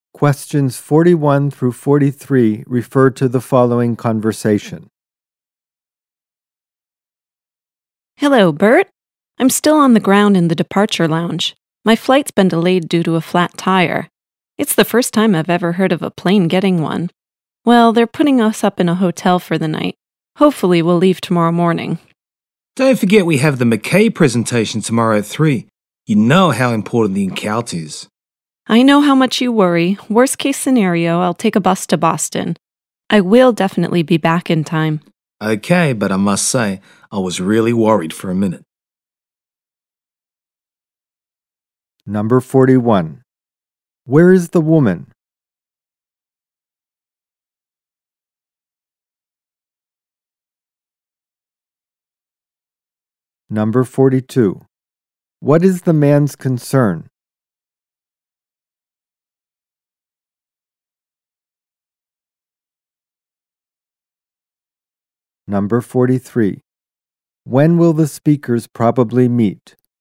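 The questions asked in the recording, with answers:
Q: Where is the woman?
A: In the airport departure lounge

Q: What is the man's concern?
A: That she won't be back in time for the McKay presentation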